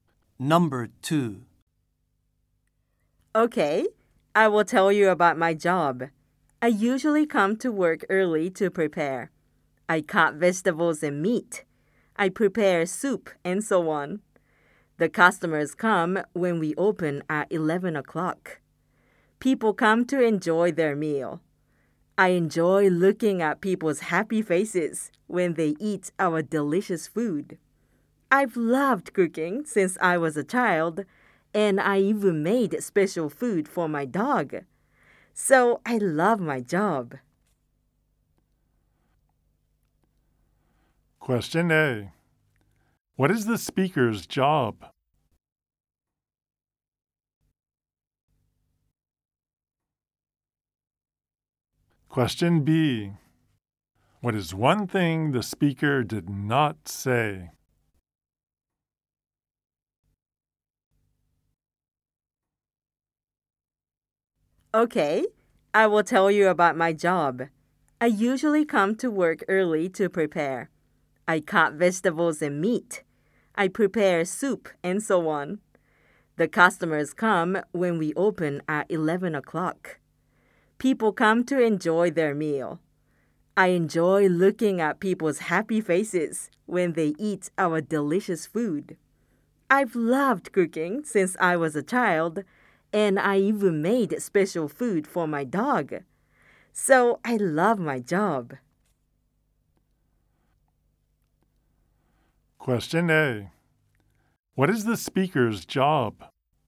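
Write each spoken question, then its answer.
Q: What is the speaker's job?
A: A cook at a restaurant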